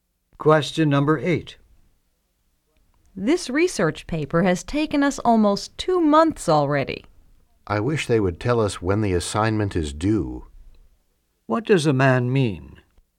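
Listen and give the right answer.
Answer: He doesn't know when the paper is due.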